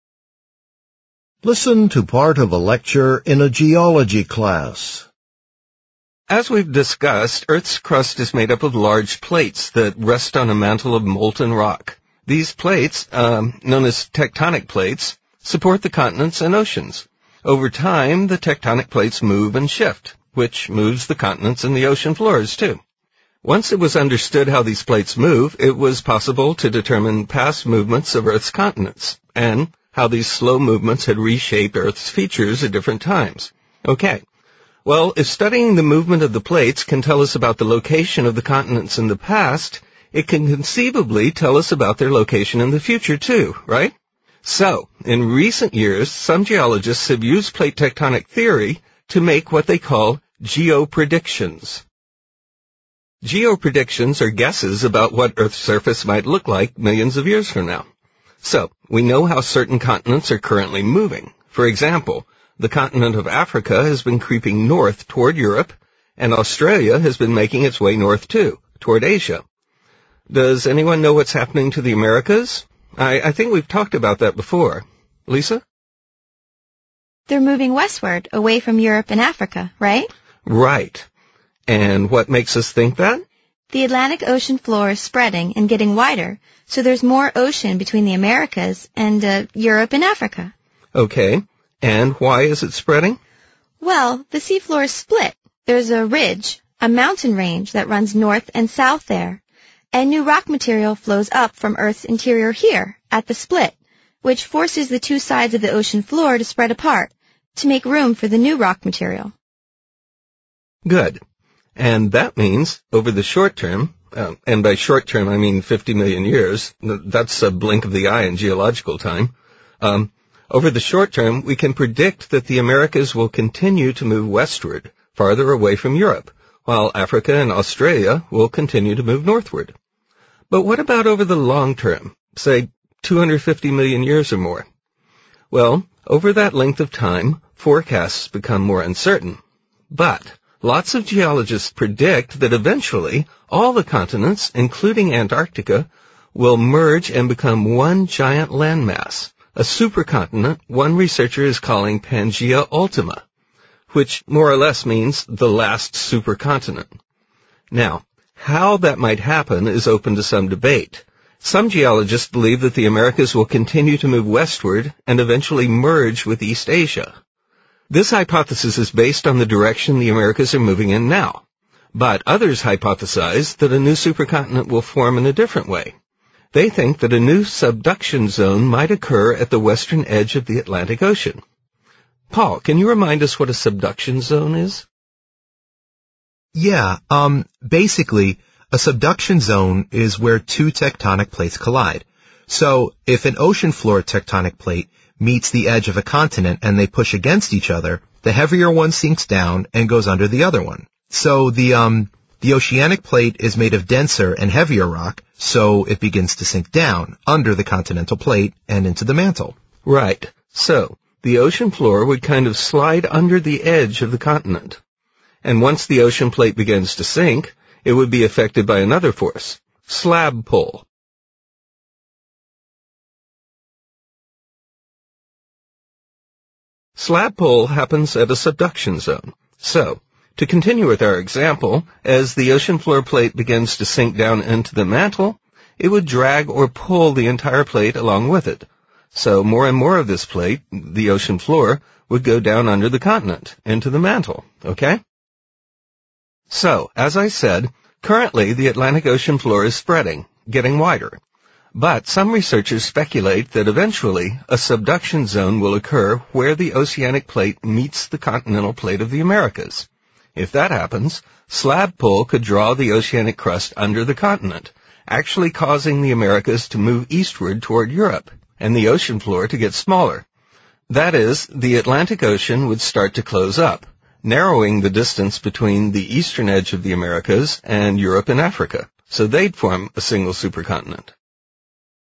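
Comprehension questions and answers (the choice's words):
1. What is the lecture mainly about?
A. How to predict the rate of tectonic plate movement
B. A geologist's attempt to determine the position of continents in the past.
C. Some ideas about future movements of Earth's tectonic plates.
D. The history of a debate between two plate tectonic theories.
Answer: Some ideas about future movements of Earth's tectonic plates.

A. Northward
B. Westward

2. Africa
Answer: Northward

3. Americas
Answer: Westward

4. Australia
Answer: Northward

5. What process is currently taking place in the Atlantic Ocean?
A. One half of the ocean plate is sinking beneath the other half.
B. New rock is forming between two sections of the ocean floor.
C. A subduction zone is forming at the eastern edge of the ocean floor.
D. The ocean plate is moving away from the continental plates that are under the Americas.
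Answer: New rock is forming between two sections of the ocean floor.

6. What long-term geopredictions do many geologists make?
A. Continents will become smaller than they are now.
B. Subduction will cause one continent to sink under an ocean.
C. North and South America will move away from each other.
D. The current continents will eventually join together.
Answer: The current continents will eventually join together.

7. Based on the discussion, what happens when a continental plate and an oceanic plate collide?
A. The edge of the oceanic plate moves down into the mantle.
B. Slab pull causes the ocean floor to expand.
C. New rock material rises to the surface at the subduction zone.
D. Parts of each plate break off into the ocean.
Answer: The edge of the oceanic plate moves down into the mantle.

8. What is the important difference between the two hypotheses discussed by the professor?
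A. They make different predictions about the direction in which the American continents will move.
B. They make different predictions about how long it will take for Pangaea Ultima to form.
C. Only one predicts that Asia will eventually begin to move eastward.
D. Only one predicts that some tectonic plates will eventually stop moving.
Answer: They make different predictions about the direction in which the American continents will move.

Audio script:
Professor As we've discussed, Earth's crust is made up of large plates that rest on a mantle of molten rock. These plates... uh... now these tectonic plates support the continents and oceans. Over time, the tectonic plates move and shift, which moves the continents and the ocean floors too. Once it was understood how these plates move, it was possible to determine past movements of Earth's continents and, how these slow movements have reshaped Earth's features at different times. 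Well, as studying the movements of the plates can tell us about the location of the continents in the past, it can conceivably tell us about their location in the future too, right? So, in recent years, some geologists have used plate tectonic theory to make what they call geopredictions. Geopredictions are guesses about what Earth's surface might look like millions of years from now. So, we know how certain continents are currently moving. For example, the continents of Africa has been creeping north toward Europe. And Australia has been making its way north too, toward Asia. Does anyone know what's happening to the Americas? I... I think we've talked about that before. Lisa? Student A They are moving westward, away from Europe and Africa. Right? And what makes us think that? Student A The Atlantic Ocean floor is spreading and getting wider, so there is more ocean between the Americas and uh, Europe and Africa. 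And why is it spreading? Student A Well, the seafloor is spilt. There is a ridge, a mountain range that runs north and south there. And the rock material flows up from Earth's interior here, at the split, which forces the two sides of the ocean floor to spread apart, to make room for the new rock material. And that means, over the short term... uh... and by short term I mean 50 million years, that's a blink of the eye in geological time. over the short term, we can predict that the Americas will continue to move westward, farther away from Europe, while Africa and Australia will continue to move northward. But what about over the long term? Say 250 million years or more. Well, over that length of time, forecasts become more uncertain. But lots of geologists predict that eventually all the continents, including Antarctica, will merge and become one giant land mass, a super continent, one researcher is calling Pangaea Ultima, which more or less means the last super continent.
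Now, how that might happen is open to some debate. Some geologists believe that the Americas will continue to move westward and eventually merge with East Asia. This hypothesis is based on the direction the Americas are moving in now. But others hypothesize that a new super continent will form in a different way. They think that a new subduction zone will might occur at the western edge of the Atlantic Ocean. Paul, can you remind us what a subduction zone is? basically, a subduction zone is where two tectonic plates collide. So if an ocean floor tectonic plate meets the edge of a continent and they push against each other, the heavier one sinks down and goes under the other one. So the... the oceanic plate is made of denser and heavier rock, so it begins to sink down under the continental plate and into the mantle. So the ocean floor would kind of slide under the edge of the continent. And once the ocean plate begins to sink, it would be affected by another force – slab pull. 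Slab pull happens at the subduction zone. So to continue with our example... As the ocean floor plate begins to sink down into the mantle, it would drag or pull the entire plate along with it. So more and more of this plate, the ocean floor, would go down under the continent into the mantle. So, as I said, currently the Atlantic Ocean floor is spreading, getting wider, but some researchers speculate that eventually a subduction zone will occur where the oceanic plate meets the continental plate of the Americas. If that happens, slab pull could draw the oceanic crust under the continent, actually causing the Americas to move eastward toward Europe and the ocean floor to get smaller. That is, the Atlantic Ocean would start to close up, narrowing the distance between the eastern edge of the Americas and Europe and Africa.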